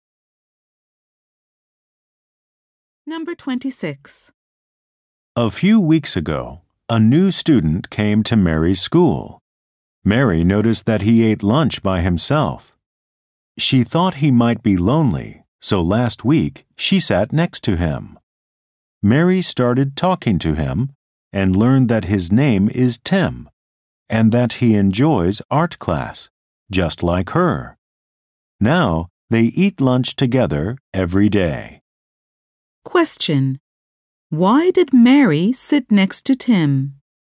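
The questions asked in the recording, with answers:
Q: Why did Mary sit next to Tim?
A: She thought he might be lonely.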